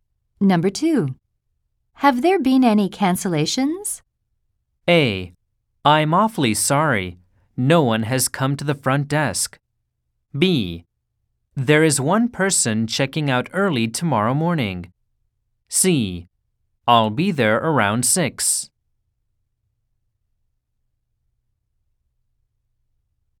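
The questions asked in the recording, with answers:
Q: Have there been any cancellations?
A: B: There is one person checking out early tomorrow morning.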